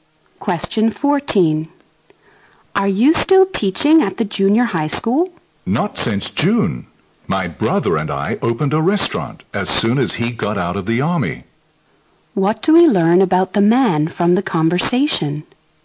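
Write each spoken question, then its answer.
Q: What do we learn about the man from the conversation?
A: He stopped teaching in June and opened a restaurant with his brother.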